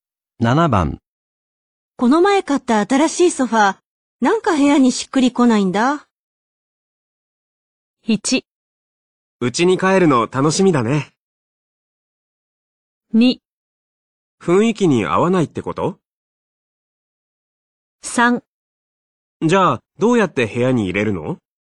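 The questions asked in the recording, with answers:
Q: この前買った新しいソファー、なんか部屋にしっくりこないんだ。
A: 2: 雰囲気に合わないってこと?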